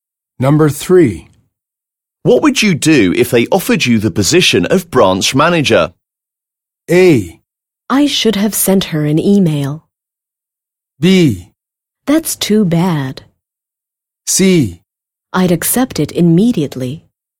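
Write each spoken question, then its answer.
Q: What would you do if they offered you the position of branch manager?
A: C: I'd accept it immediately.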